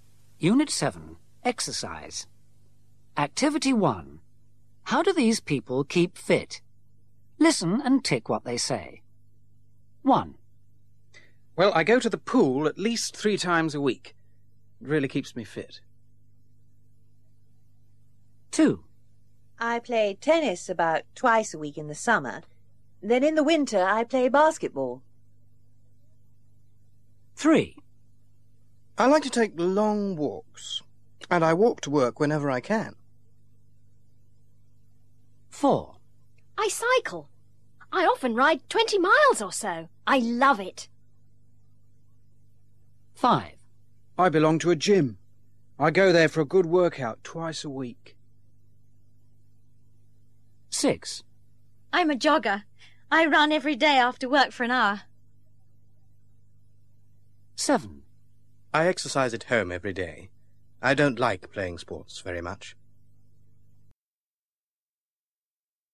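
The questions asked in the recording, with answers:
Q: How do these people keep fit?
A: Swimming at the pool at least 3 times a week

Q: How do these people keep fit?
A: Tennis in summer, basketball in winter

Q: How do these people keep fit?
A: Walking

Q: How do these people keep fit?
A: Cycling

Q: How do these people keep fit?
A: Working out at a gym twice a week

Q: How do these people keep fit?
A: Jogging every day after work

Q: How do these people keep fit?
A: Exercising at home every day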